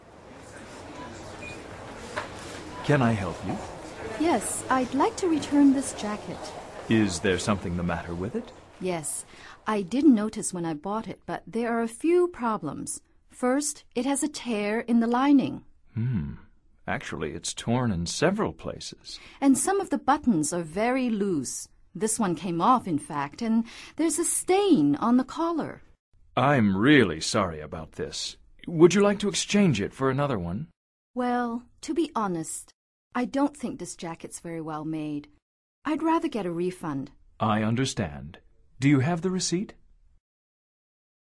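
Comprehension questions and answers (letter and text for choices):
Activity 72: Basándote en los comentarios anteriores, selecciona las opciones más adecuadas para cada oración. Verifica luego las respuestas correctas.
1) What's wrong with Katty's jacket?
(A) Tears, loose buttons and a stain.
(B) A stain and some tears.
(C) Some tears and a loose button.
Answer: (A) Tears, loose buttons and a stain.

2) What happened to one of the buttons?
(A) It fell down.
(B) It's torn.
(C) It came off.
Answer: (C) It came off.

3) What would Katty like to do?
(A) To exchange the jacket.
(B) To get a refund.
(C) To get a receipt.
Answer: (B) To get a refund.

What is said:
Can I help you?
Yes, I'd like to return this jacket.
Is there something the matter with it?
Yes. I didn't notice when I bought it, but there are a few problems. First, it has a tear in the lining.
Hmm. Actually, it's torn in several places.
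And some of the buttons are very loose. This one came off in fact, and ... there's a stain on the collar.
I'm really sorry about this. Would you like to exchange it for another one?
Well, to be honest, I don't think this jacket is very well made. I'd rather get a refund.
I understand. Do you have the receipt?

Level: Nivel Avanzado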